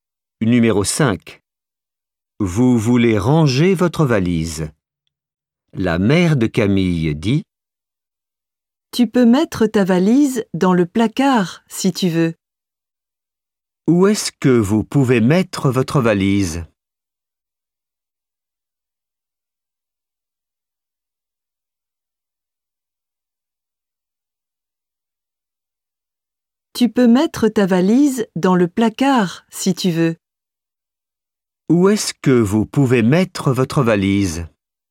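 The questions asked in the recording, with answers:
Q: Où est-ce que vous pouvez mettre votre valise?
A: Dans le placard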